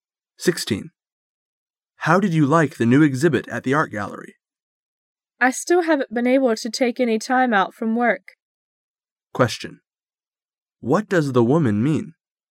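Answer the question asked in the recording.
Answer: She hasn't seen the exhibit yet because of work.

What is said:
[解析] M: How did you like the new exhibit at the art gallery? W: I still haven't been able to take any time out from work. Q: What does the woman mean?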